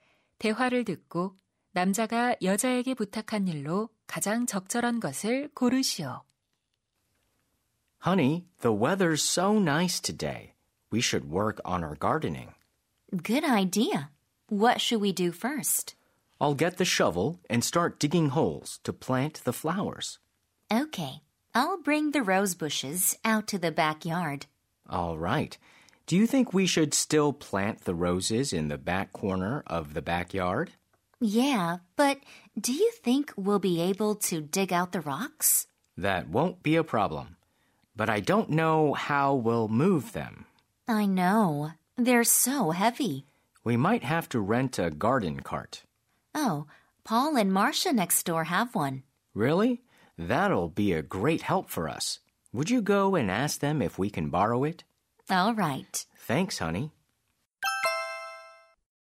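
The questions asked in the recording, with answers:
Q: 대화를 듣고 남자가 여자에게 부탁한 일로 가장 적절한 것을 고르시오.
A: 이웃에게 정원용 손수레를 빌려 달라고 부탁하기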